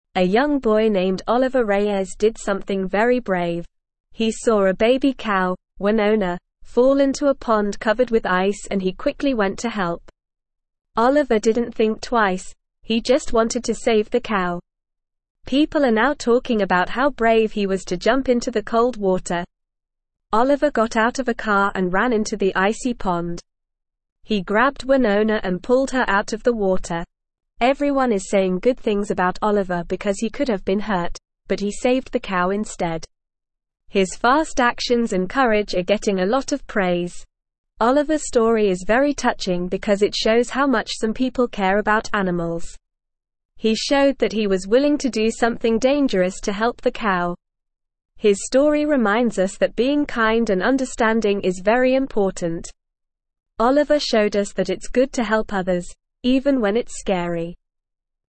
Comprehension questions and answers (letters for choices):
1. What did Oliver see fall into the pond?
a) A baby cow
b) A dog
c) A cat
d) A horse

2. What did Oliver do when he saw the cow in the pond?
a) He called for help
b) He jumped into the water to save it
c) He walked away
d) He took a picture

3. Why are people talking about Oliver?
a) Because he was scared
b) Because he was brave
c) Because he was mean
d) Because he was lazy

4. Why are people praising Oliver?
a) Because he hurt himself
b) Because he scared the cow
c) Because he didn't help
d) Because he saved the cow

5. What does Oliver's story remind us?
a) That being mean is important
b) That being lazy is important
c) That being scared is important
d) That being kind is important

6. What did Oliver show us?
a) That it's good to hurt others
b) That it's good to scare others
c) That it's good to help others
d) That it's good to ignore others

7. What did Oliver's actions show?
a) That he didn't care about the cow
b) That he didn't see the cow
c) That he cared about the cow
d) That he didn't like the cow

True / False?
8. Oliver could have been hurt, but he chose to save the cow instead.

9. Oliver's story reminds us that it's not important to be kind and understanding.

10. Oliver Reyes saved a baby cow named Wynonna from a frozen pond.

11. Oliver didn't hesitate to jump into the cold water to rescue the cow.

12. Helping others, even when it's scary, is a good thing to do.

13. People are criticizing Oliver for his cowardice and slow thinking.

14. Oliver's cowardice is getting a lot of negative attention.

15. Oliver's actions show how little he cares about animals.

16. He saw a (1)______ cow, Wynonna, fall into a (2)______ covered with ice and he quickly went to help.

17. He saw a (1)______ cow, Wynonna, fall into a (2)______ covered with ice and he quickly went to help.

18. Oliver didn't (3)______ twice; he just wanted to save the cow.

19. People are now talking about how brave he was to jump into the (4)______ (5)______.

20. People are now talking about how brave he was to jump into the (4)______ (5)______.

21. He (6)______ Wynonna and pulled her out of the water.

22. Everyone is saying good things about Oliver because he could have been (7)______, but he saved the cow instead.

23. Oliver's story is very touching because it (8)______ how (9)______ some people care about animals.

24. Oliver's story is very touching because it (8)______ how (9)______ some people care about animals.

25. His story reminds us that being kind and understanding is very (10)______.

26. (11)______ showed us that it's (12)______ to help others, even when it's scary.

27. (11)______ showed us that it's (12)______ to help others, even when it's scary.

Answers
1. a
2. b
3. b
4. d
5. d
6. c
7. c
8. True
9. False
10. True
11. True
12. True
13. False
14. False
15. False
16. baby
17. pond
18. think
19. cold
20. water
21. grabbed
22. hurt
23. shows
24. much
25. important
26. Oliver
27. good

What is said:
A young boy named Oliver Reyes did something very brave. He saw a baby cow, Wynonna, fall into a pond covered with ice and he quickly went to help. Oliver didn't think twice; he just wanted to save the cow. People are now talking about how brave he was to jump into the cold water.
Oliver got out of a car and ran into the icy pond. He grabbed Wynonna and pulled her out of the water. Everyone is saying good things about Oliver because he could have been hurt, but he saved the cow instead. His fast actions and courage are getting a lot of praise.
Oliver's story is very touching because it shows how much some people care about animals. He showed that he was willing to do something dangerous to help the cow. His story reminds us that being kind and understanding is very important. Oliver showed us that it's good to help others, even when it's scary.

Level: Level 2